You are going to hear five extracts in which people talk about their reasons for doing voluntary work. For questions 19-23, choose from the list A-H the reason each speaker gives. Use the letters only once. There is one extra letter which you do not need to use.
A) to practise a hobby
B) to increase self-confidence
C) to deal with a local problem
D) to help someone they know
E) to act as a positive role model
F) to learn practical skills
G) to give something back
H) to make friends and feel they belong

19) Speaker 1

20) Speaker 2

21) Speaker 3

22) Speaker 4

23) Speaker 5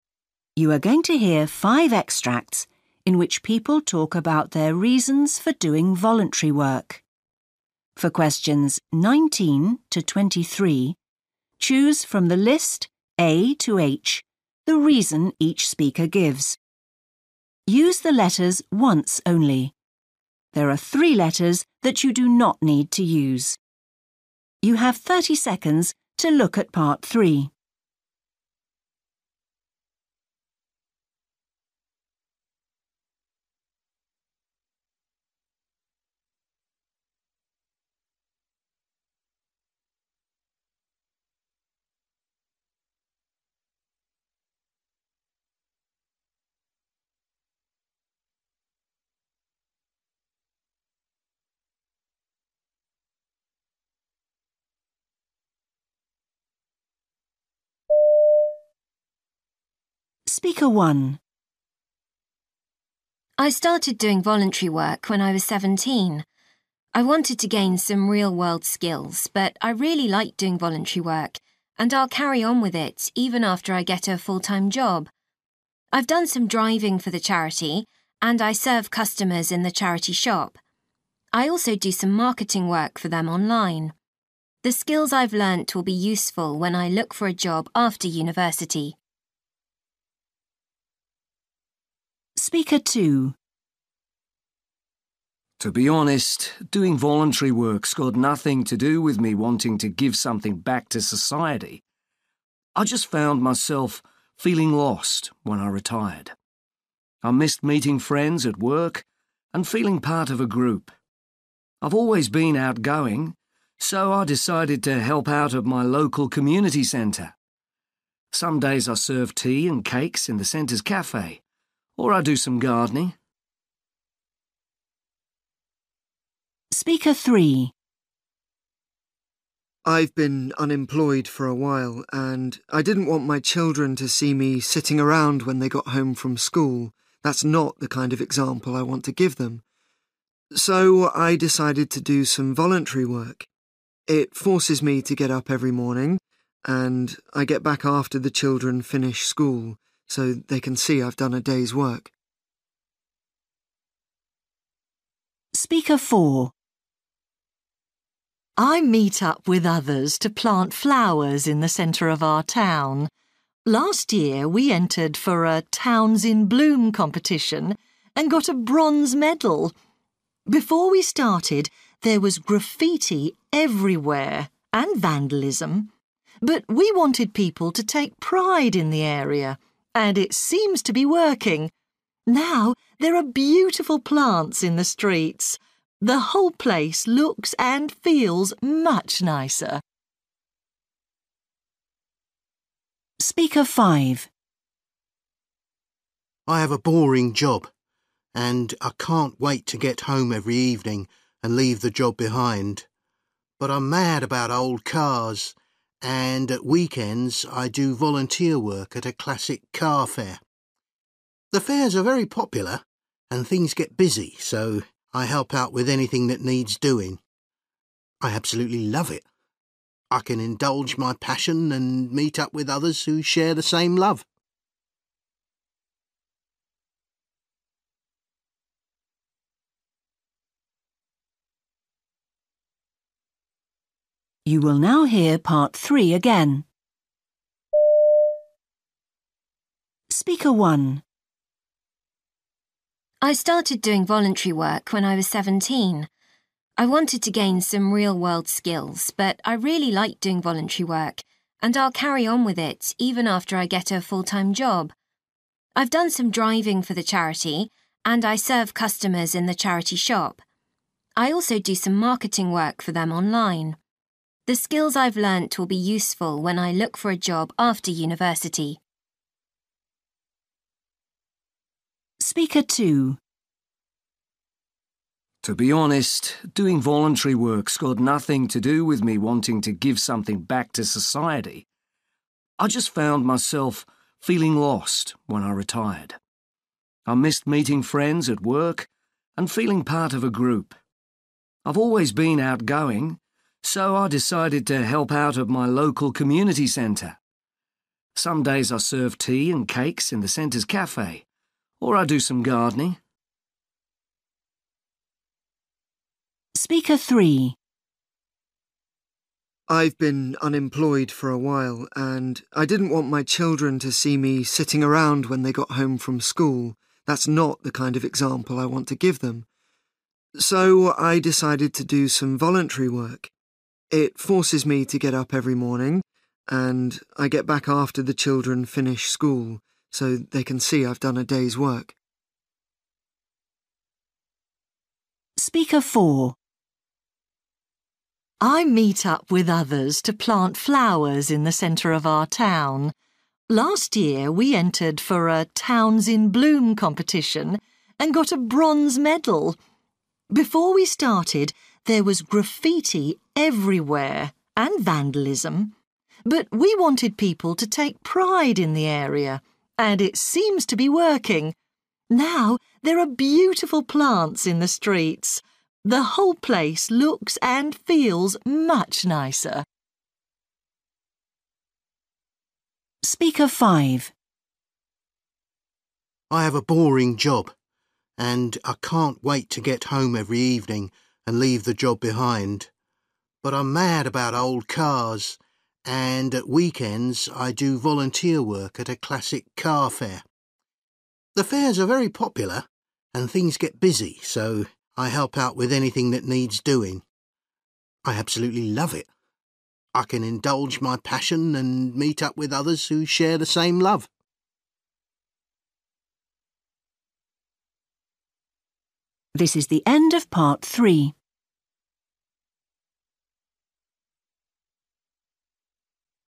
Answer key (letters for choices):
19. F
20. H
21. E
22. C
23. A

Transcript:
Woman: I started doing voluntary work when I was seventeen. I wanted to gain some real-world skills, but I really like doing voluntary work and I'll carry on with it even after I get a full-time job. I've done some driving for the charity and I serve customers in the charity shop. I also do some marketing work for them online. The skills I've learnt will be useful when I took for a job after university.
Man: To be honest, doing voluntary work's got nothing to do with me wanting to give something back to society. I just found myself feeling lost when I retired. I missed meeting friends at work and feeling part of a group. I've always been outgoing, so I decided to help out at my local community centre. Some days I serve tea and cakes in the centre's café or I do some gardening.
Man: I've been unemployed for a while and I didn't want my children to see me sitting around when they got home from school. That's not the kind of example I want to give them. So I decided to do some voluntary work. It forces me to get up every morning and I get back after the children finish school so they can see I've done a day's work.
Woman: I meet up with others to plant flowers in the centre of our town. Last year we entered for a 'Towns in Bloom' competition and got a bronze medal! Before we started, there was graffiti everywhere and vandalism. But we wanted people to take pride in the area – and it seems to be working! Now there are beautiful plants in the streets. The whole place looks and feels much nicer.
Man: I have a boring job and I can't wait to get home every evening and leave the job behind. But I'm mad about old cars and at weekends I do volunteer work at a classic car fair. The fairs are very popular and things get busy, so I help out with anything that needs doing. I absolutely love it. I can indulge my passion and meet up with others who share the same love.

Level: FCE (B2)